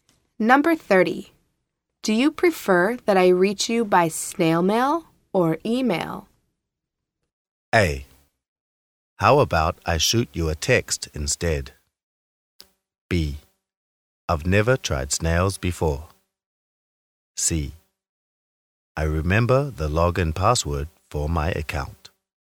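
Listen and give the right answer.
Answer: A: How about I shoot you a text instead?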